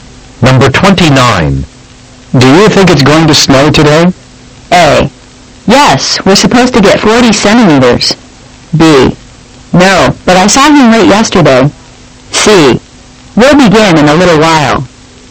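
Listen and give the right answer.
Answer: A: Yes, we're supposed to get 40 centimeters.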